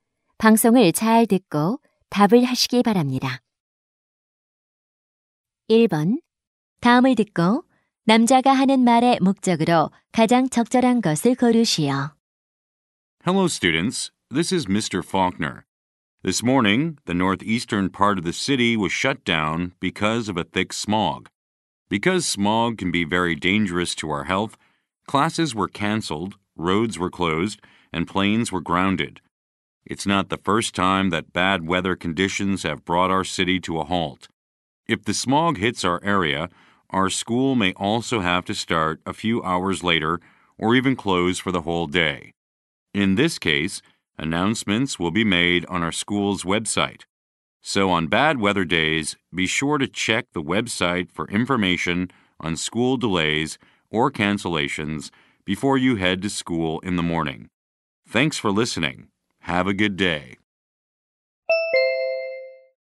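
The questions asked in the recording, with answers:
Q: 다음을 듣고 남자가 하는 말의 목적으로 가장 적절한 것을 고르시오.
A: 악천후 시 등교 지연·휴교 정보를 학교 웹사이트에서 확인하도록 안내하려고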